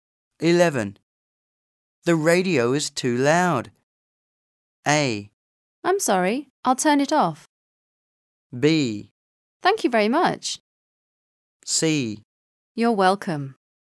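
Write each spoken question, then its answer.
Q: The radio is too loud.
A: A: I'm sorry, I'll turn it off.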